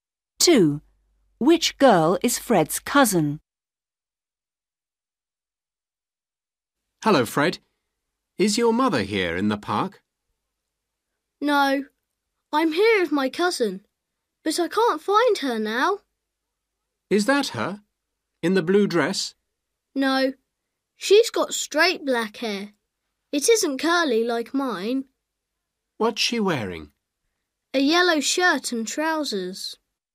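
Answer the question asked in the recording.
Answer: the girl with straight black hair in a yellow shirt and trousers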